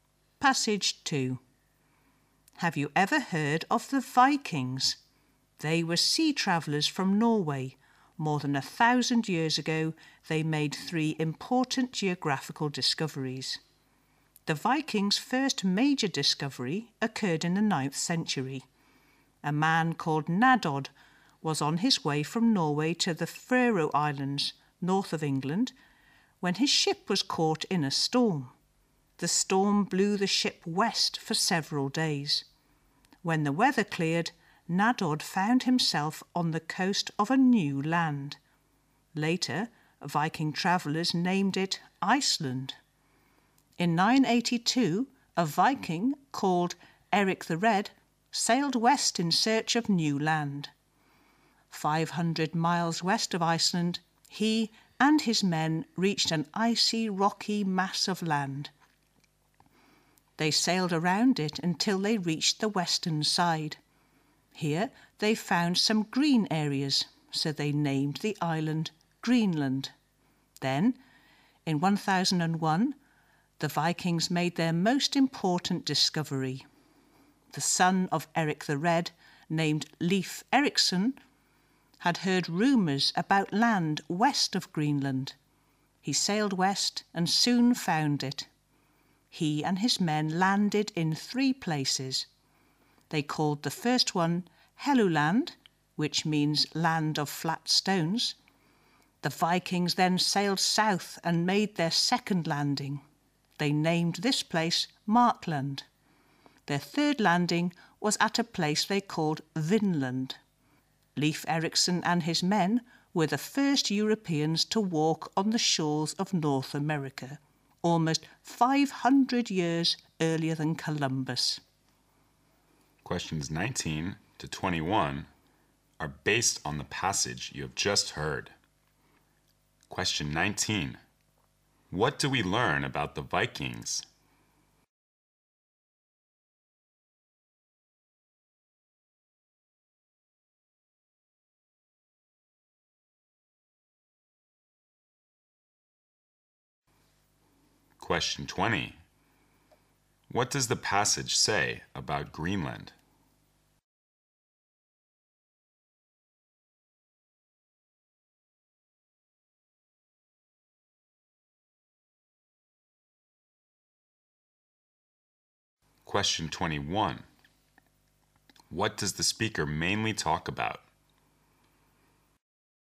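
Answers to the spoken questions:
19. They were sea travellers from Norway who made three important geographical discoveries
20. It was named for the green areas found on its western side
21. The Vikings' geographical discoveries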